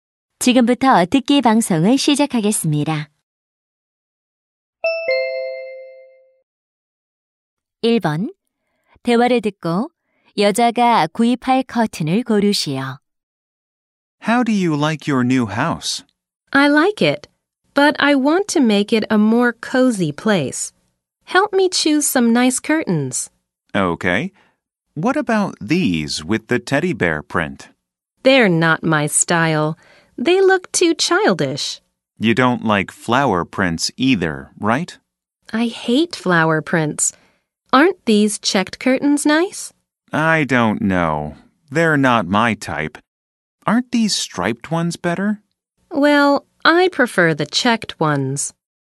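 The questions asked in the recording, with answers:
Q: 대화를 듣고 여자가 구입할 커튼을 고르시오.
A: 체크무늬 커튼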